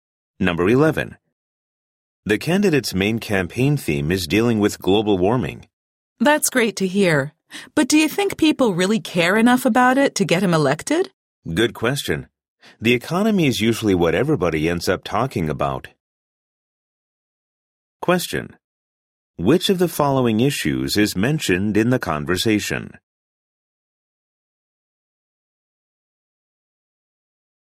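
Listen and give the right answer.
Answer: Global warming (and the economy)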